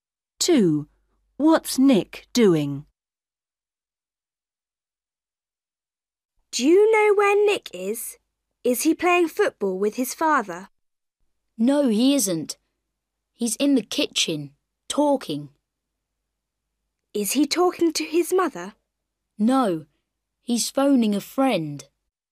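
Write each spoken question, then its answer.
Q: What's Nick doing?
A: phoning a friend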